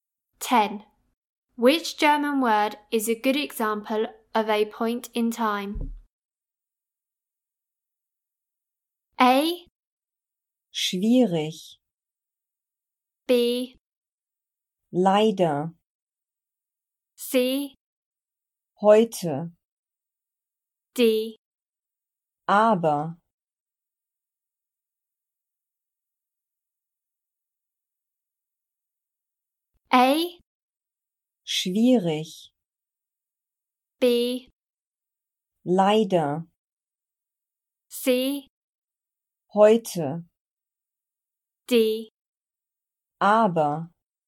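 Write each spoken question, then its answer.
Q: Which German word is a good example of a point in time?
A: C: Heute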